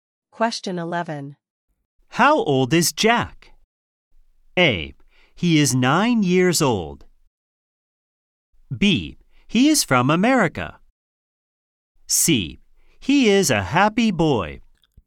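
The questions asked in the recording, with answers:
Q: How old is Jack?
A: A: He is 9 years old.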